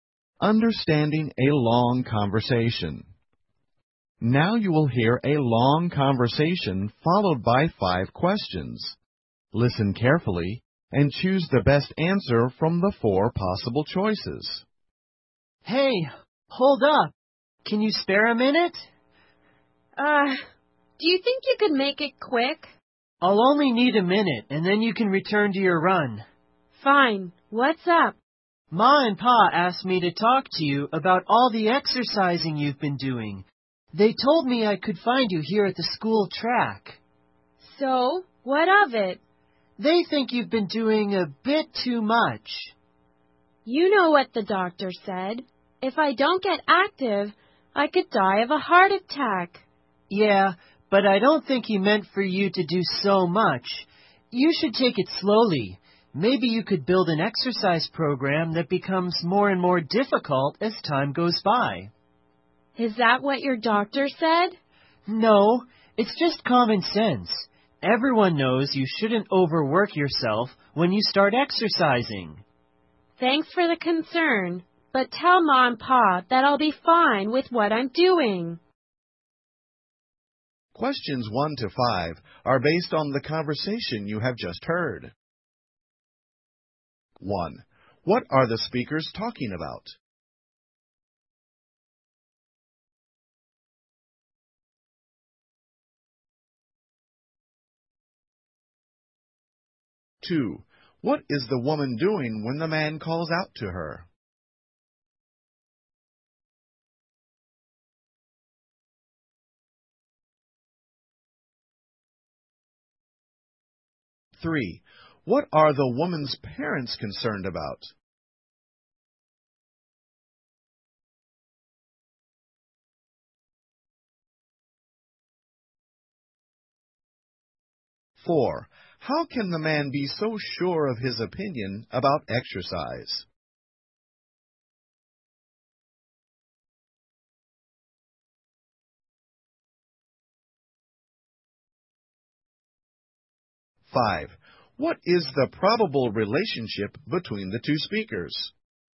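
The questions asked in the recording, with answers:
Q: What are the speakers talking about?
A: The woman's exercising too much.

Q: What is the woman doing when the man calls out to her?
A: Running at the school track.

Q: What are the woman's parents concerned about?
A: That she is exercising too much.

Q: How can the man be so sure of his opinion about exercise?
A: It's common sense.

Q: What is the probable relationship between the two speakers?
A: Siblings (brother and sister).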